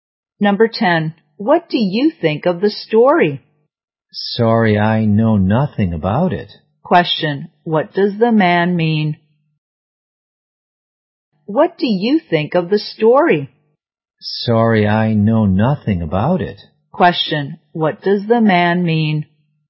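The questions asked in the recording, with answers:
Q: Question, what does the man mean?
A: He doesn't know the story.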